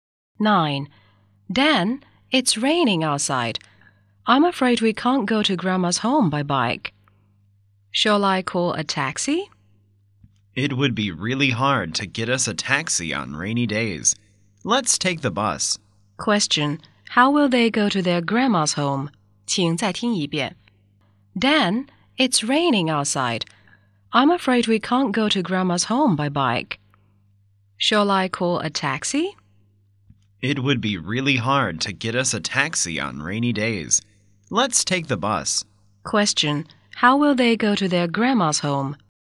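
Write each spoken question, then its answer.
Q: How will they go to their grandma's home?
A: By bus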